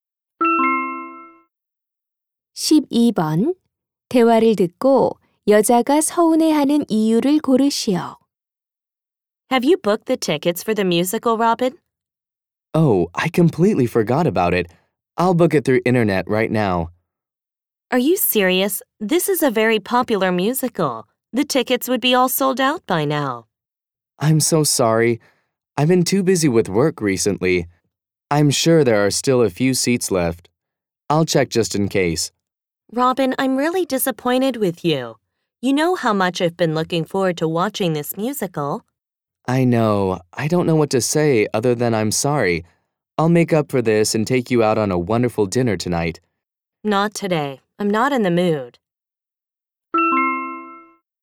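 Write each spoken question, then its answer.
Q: 대화를 듣고 여자가 서운해하는 이유를 고르시오.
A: 남자가 뮤지컬 표 예매를 잊어버려서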